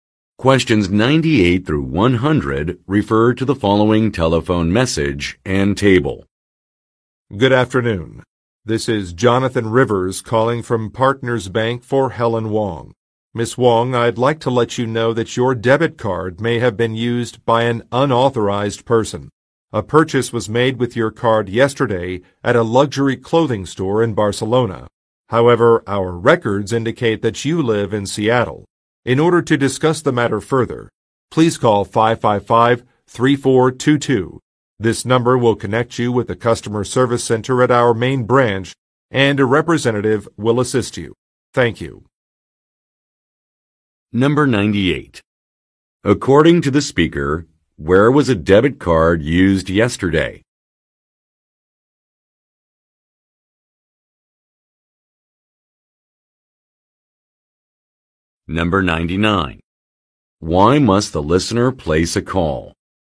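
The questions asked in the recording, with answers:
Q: According to the speaker, where was a debit card used yesterday?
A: At a luxury clothing store in Barcelona

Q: Why must the listener place a call?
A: To discuss possible unauthorized use of her debit card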